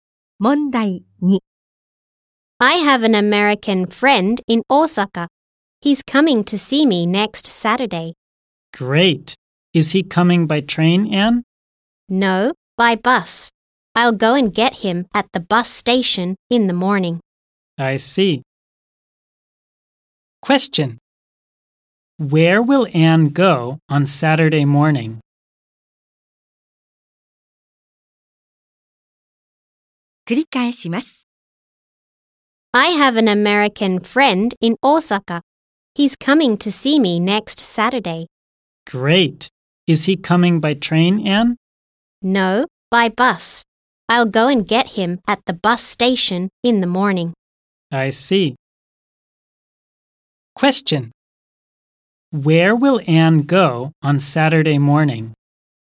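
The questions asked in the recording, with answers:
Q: Where will Anne go on Saturday morning?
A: To the bus station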